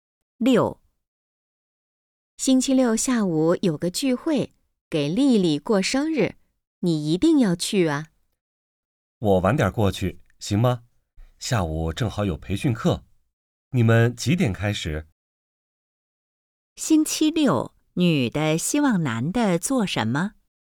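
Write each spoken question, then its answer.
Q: 星期六,女的希望男的做什么?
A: 参加丽丽的生日聚会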